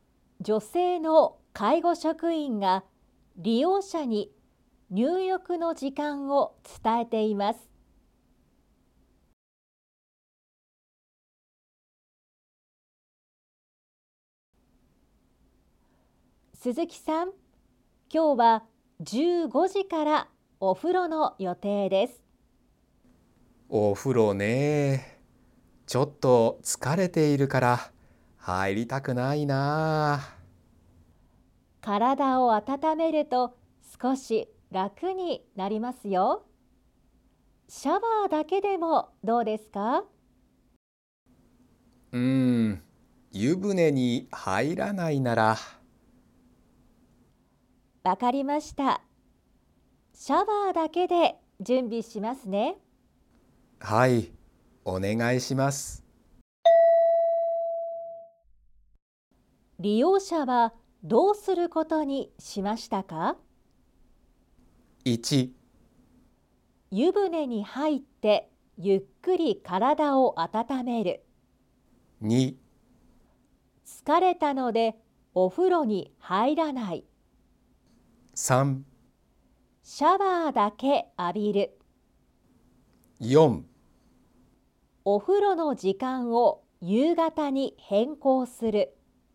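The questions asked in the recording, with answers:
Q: 利用者はどうすることにしましたか?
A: 3: シャワーだけ浴びる。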